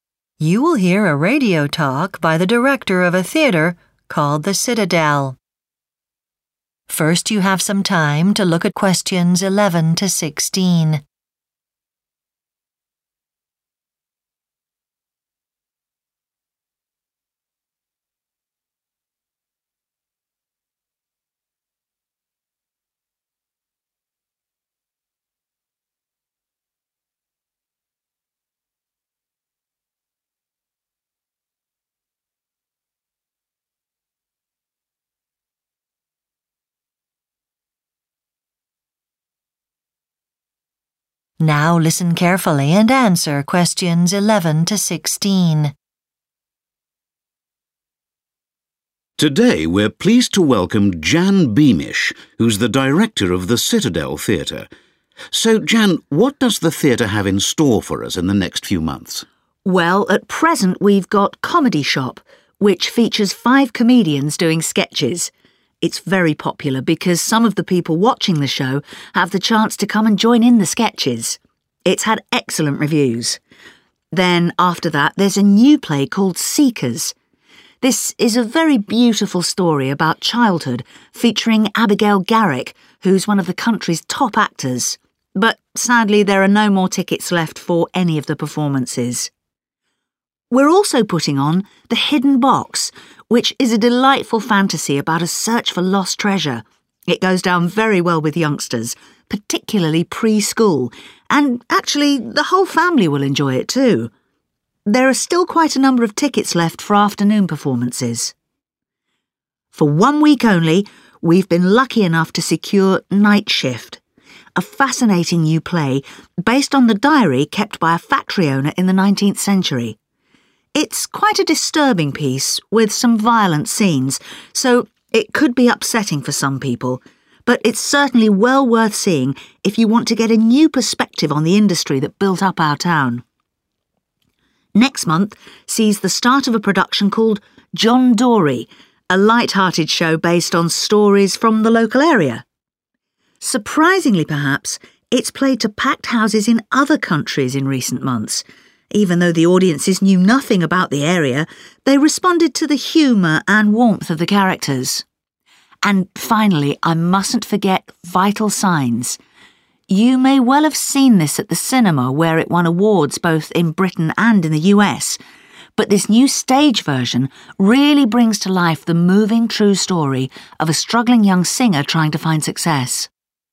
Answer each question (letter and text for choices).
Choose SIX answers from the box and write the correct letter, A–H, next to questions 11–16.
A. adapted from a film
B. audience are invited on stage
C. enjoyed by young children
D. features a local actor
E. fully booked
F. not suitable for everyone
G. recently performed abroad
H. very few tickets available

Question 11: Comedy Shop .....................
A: B. audience are invited on stage

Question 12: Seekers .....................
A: E. fully booked

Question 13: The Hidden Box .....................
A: C. enjoyed by young children

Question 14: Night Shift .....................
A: F. not suitable for everyone

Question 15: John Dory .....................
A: G. recently performed abroad

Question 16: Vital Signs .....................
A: A. adapted from a film